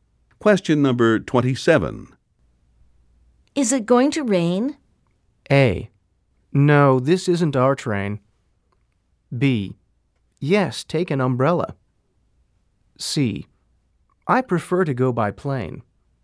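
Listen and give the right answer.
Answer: B: Yes, take an umbrella.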